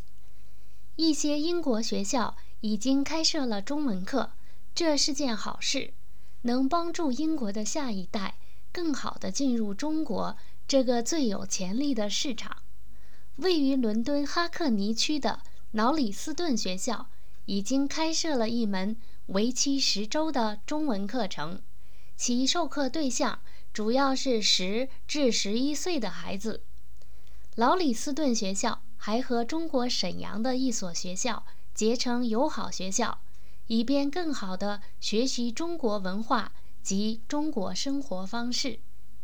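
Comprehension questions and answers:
Please answer the following questions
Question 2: Why is it a good thing to offer Chinese language courses at British schools?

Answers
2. It helps the next generation of Britons better enter China, the market with the most potential.

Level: M.Phil Year 2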